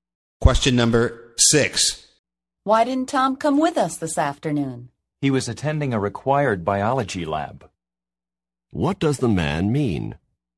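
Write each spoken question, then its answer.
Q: What does the man mean?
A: Tom had to attend a required biology lab.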